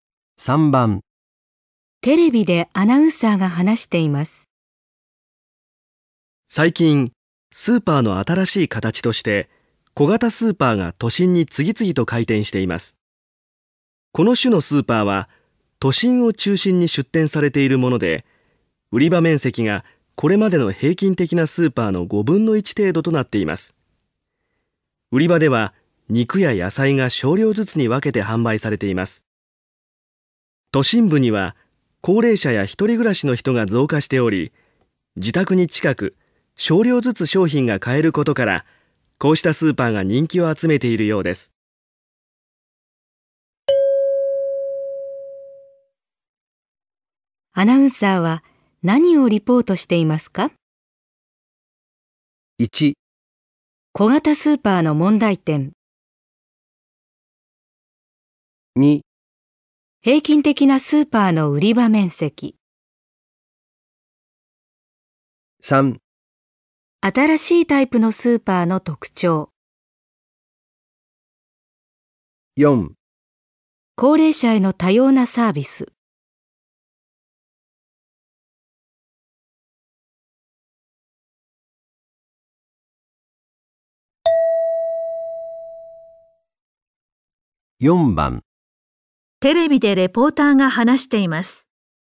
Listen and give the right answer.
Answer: 3

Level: N2 Listening · Test 3